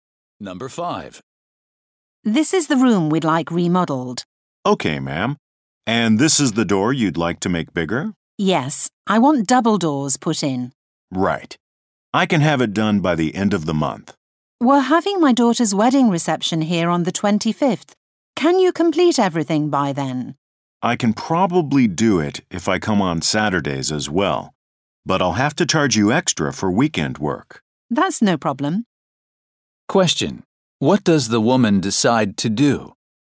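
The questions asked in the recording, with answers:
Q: What does the woman decide to do?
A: Pay extra so the work is done by the 25th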